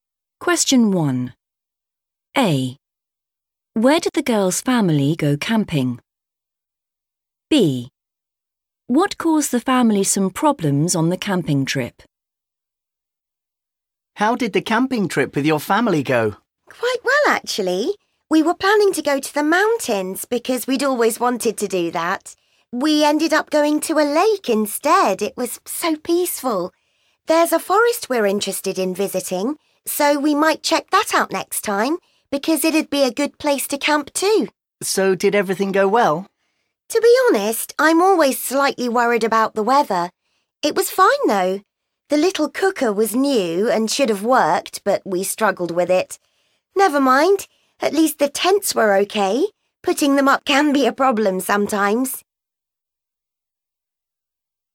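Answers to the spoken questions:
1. a lake
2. the (little) cooker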